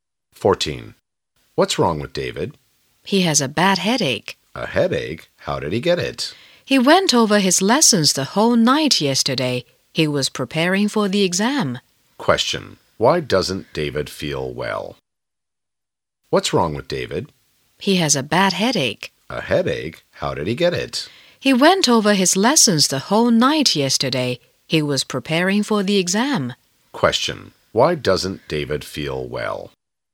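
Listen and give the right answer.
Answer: He studied the whole night for the exam.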